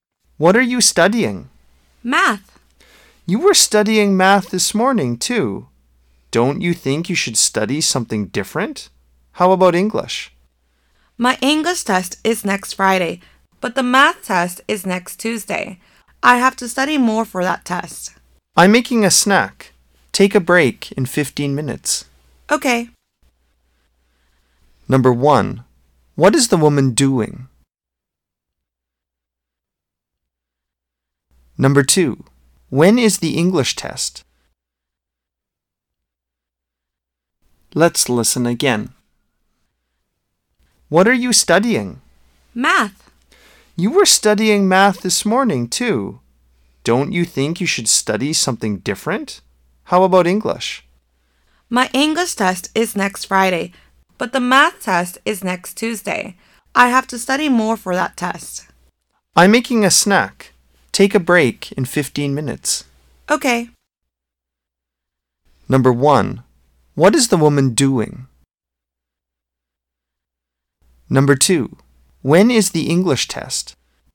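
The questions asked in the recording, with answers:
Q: What is the woman doing?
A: Making a snack

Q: When is the English test?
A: Next Friday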